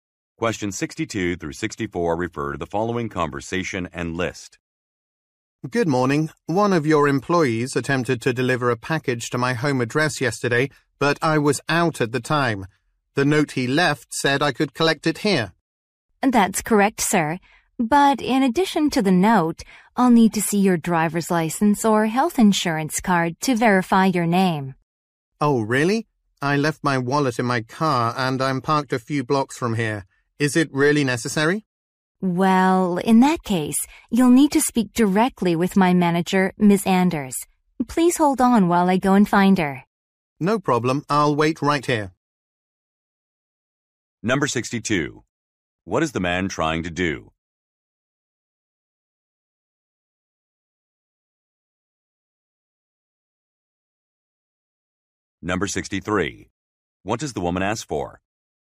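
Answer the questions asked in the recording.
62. Pick up a package
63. Photo ID (driver's license or health insurance card)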